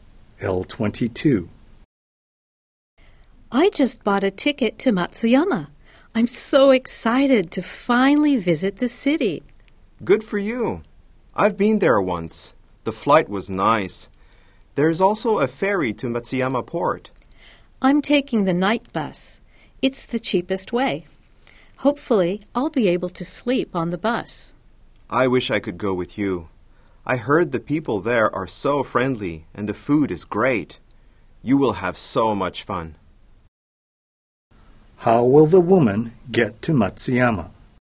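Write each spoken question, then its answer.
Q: How will the woman get to Matsuyama?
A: By night bus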